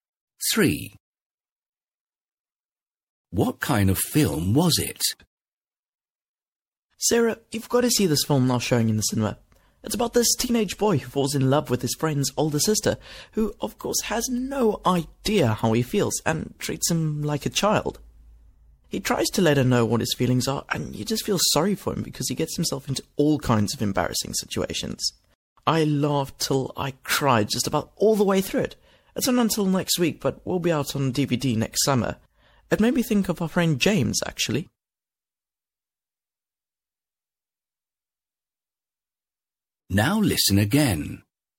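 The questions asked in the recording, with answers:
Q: What kind of film was it?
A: A (romantic) comedy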